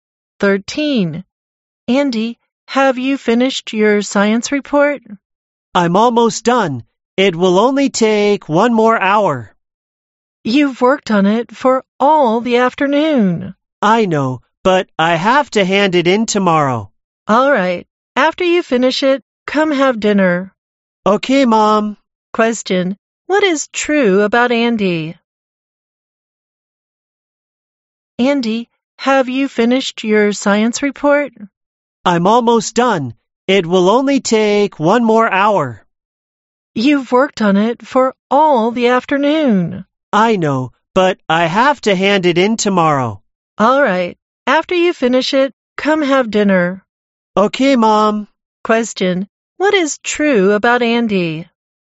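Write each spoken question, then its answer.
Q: what is true about Andy?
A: He is almost done with his science report, which is due tomorrow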